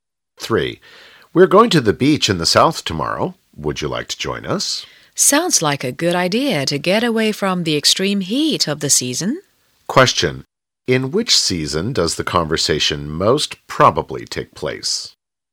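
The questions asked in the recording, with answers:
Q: In which season does the conversation most probably take place?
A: Summer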